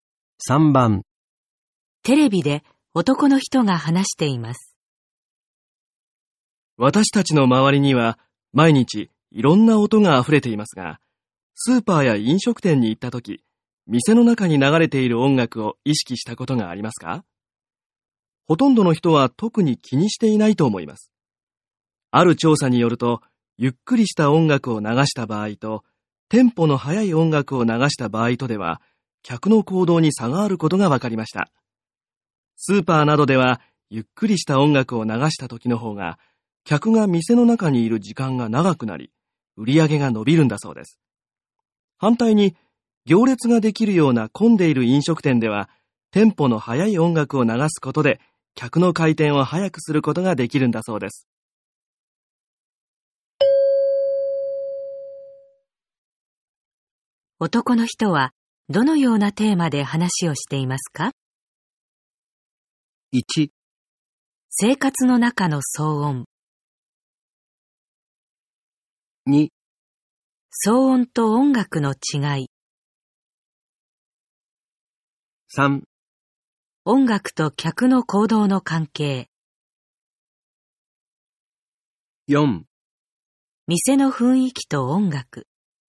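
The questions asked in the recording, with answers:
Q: 男の人は、どのようなテーマで話をしていますか?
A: 3: 音楽と客の行動の関係。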